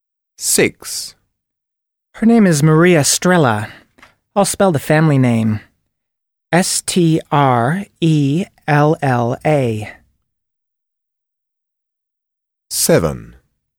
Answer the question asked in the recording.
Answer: Strella